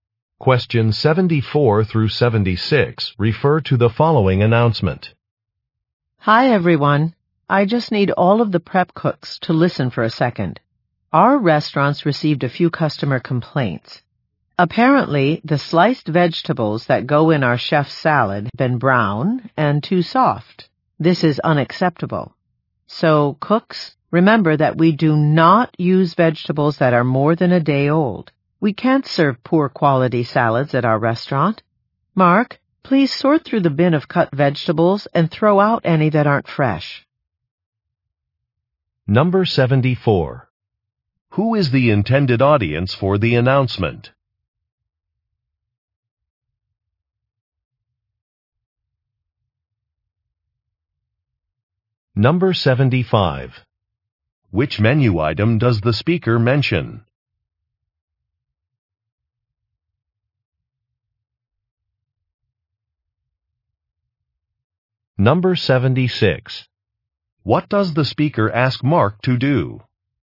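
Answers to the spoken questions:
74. Prep cooks
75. Chef's salad
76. Throw out vegetables that aren't fresh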